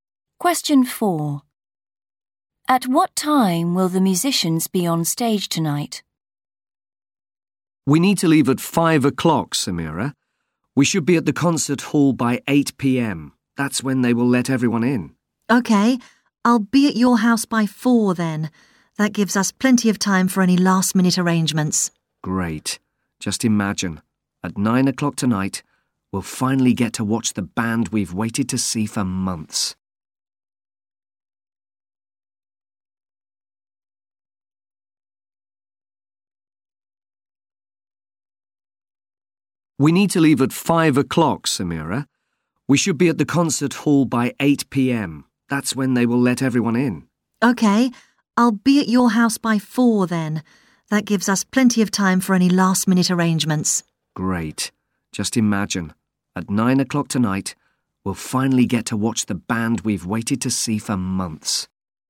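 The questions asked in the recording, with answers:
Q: At what time will the musicians be on stage tonight?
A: 9 o'clock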